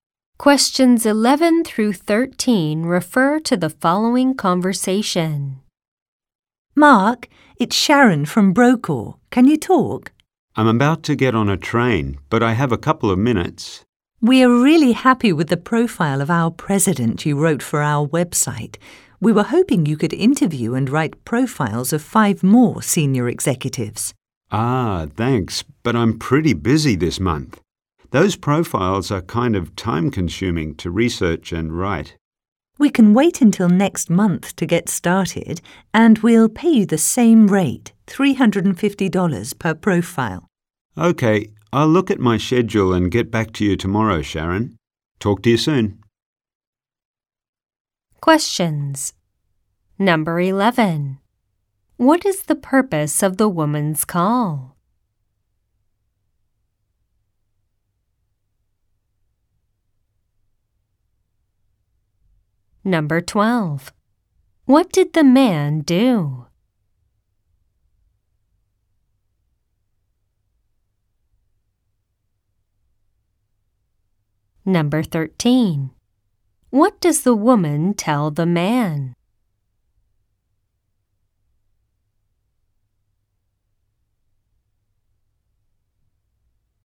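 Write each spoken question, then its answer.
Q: What is the purpose of the woman's call?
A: To ask him to write profiles of five more senior executives

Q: What did the man do?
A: He wrote a profile of their president for the website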